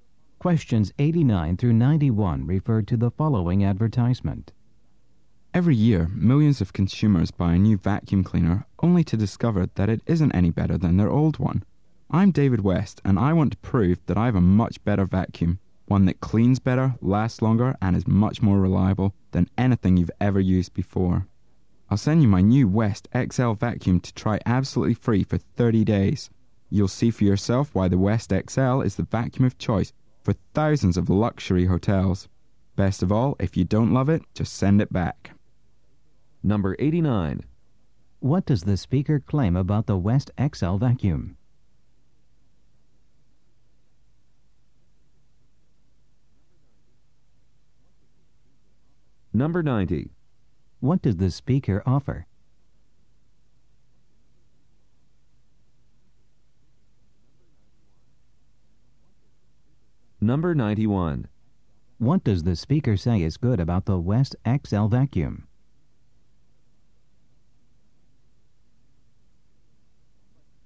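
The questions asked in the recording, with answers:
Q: What does the speaker offer?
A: A free 30-day trial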